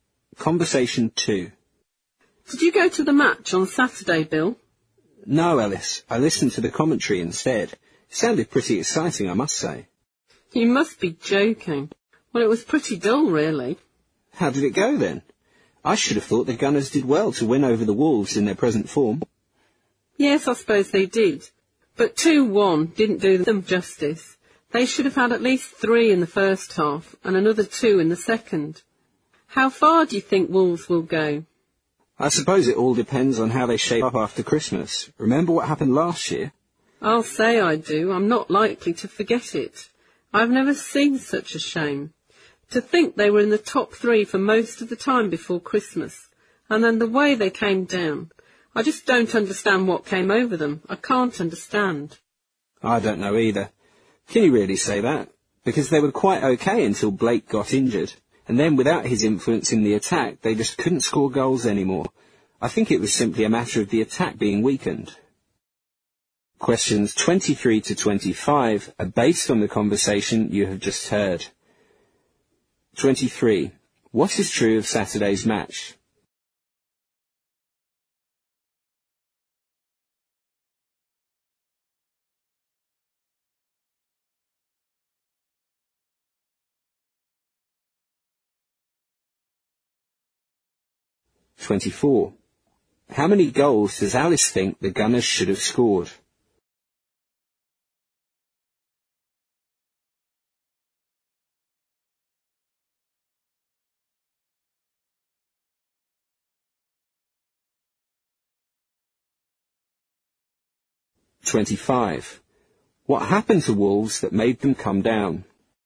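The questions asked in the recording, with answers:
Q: What is true of Saturday's match?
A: The Gunners beat the Wolves 2-1, but the match was rather dull

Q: How many goals does Alice think the Gunners should have scored?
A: At least five

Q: What happened to Wolves that made them come down?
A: Blake got injured, which weakened their attack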